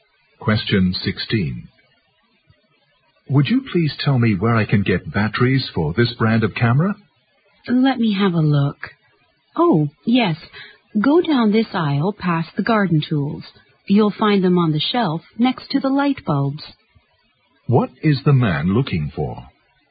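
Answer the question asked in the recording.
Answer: Camera batteries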